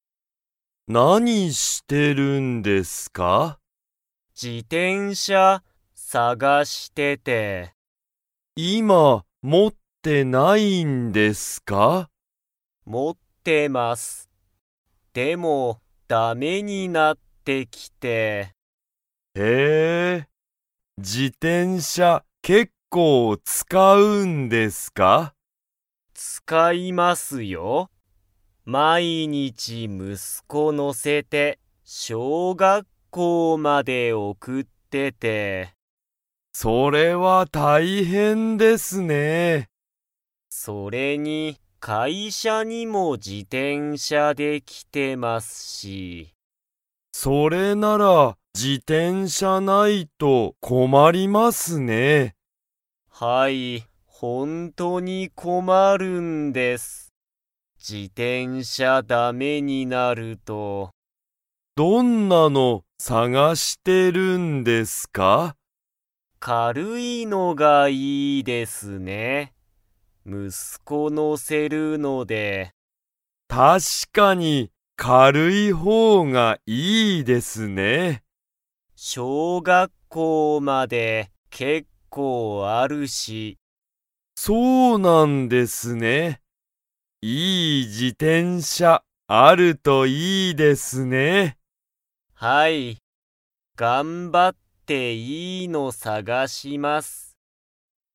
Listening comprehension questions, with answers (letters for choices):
Comprehension Quiz (Skip if you don't understand the conversation yet)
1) 田中たなかさんは、自転車じてんしゃに誰だれを乗のせますか?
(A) 田中たなかさんの友達ともだち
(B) 田中たなかさんの娘むすめ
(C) 田中たなかさんの息子むすこ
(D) 佐藤さとうさん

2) 田中たなかさんは、自転車じてんしゃがないと 。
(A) 困こまる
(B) 困こまらない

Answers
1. C
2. A

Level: Level 3